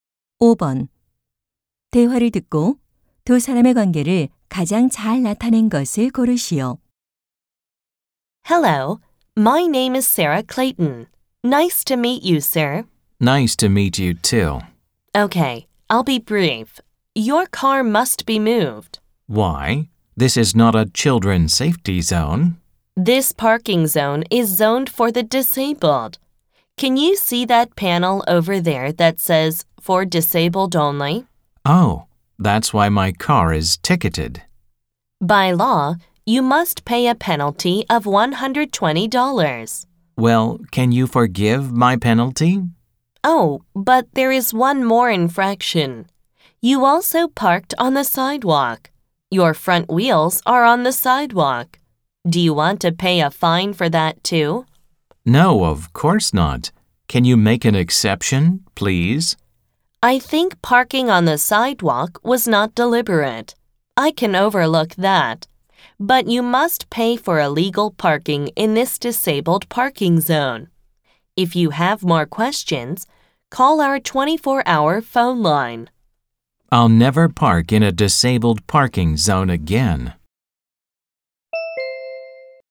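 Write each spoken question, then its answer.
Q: 대화를 듣고 두 사람의 관계를 가장 잘 나타낸 것을 고르시오.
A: 주차 단속원 - 운전자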